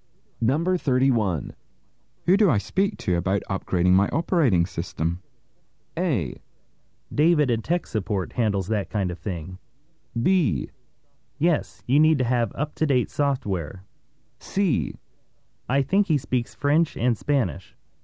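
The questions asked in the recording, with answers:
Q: Who do I speak to about upgrading my operating system?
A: A: David and tech support handles that kind of thing.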